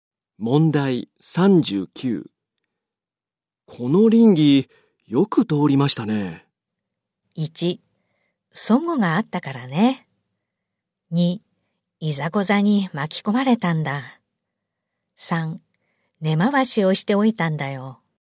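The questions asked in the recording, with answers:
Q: この稟議、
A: 3: 根回しをしておいたんだよ。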